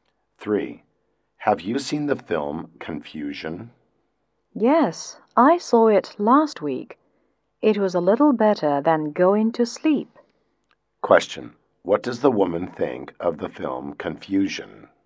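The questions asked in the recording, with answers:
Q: what does the woman think of the film Confusion?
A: It was boring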